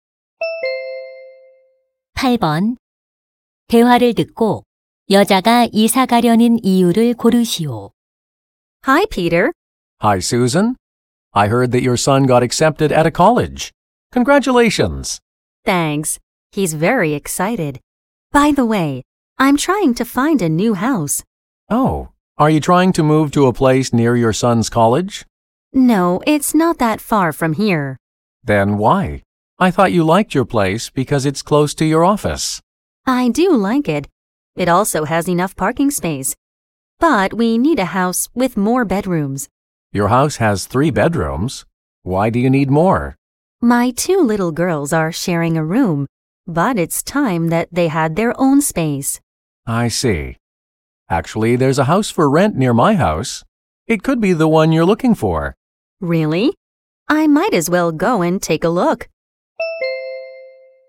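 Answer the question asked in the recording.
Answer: 딸들에게 각자의 방이 필요해서 (침실이 더 많은 집이 필요해서)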